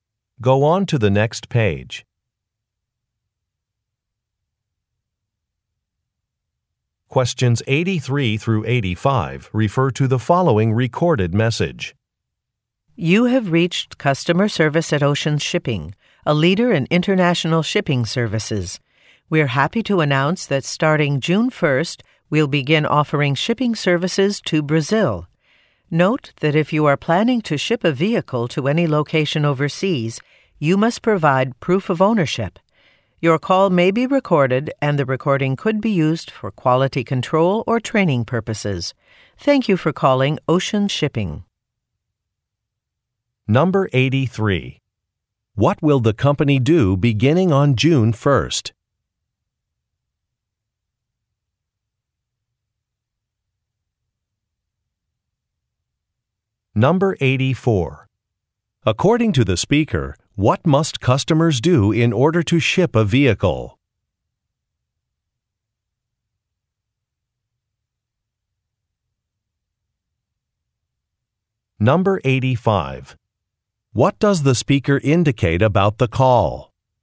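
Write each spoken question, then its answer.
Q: What will the company do beginning on June 1st?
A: Begin offering shipping services to Brazil

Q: According to the speaker, what must customers do in order to ship a vehicle?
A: Provide proof of ownership

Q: What does the speaker indicate about the call?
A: It may be recorded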